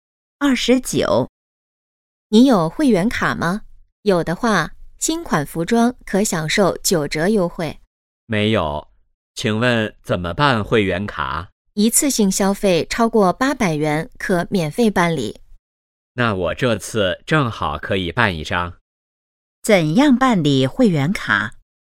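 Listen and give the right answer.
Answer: 一次性消费超过800元可免费办理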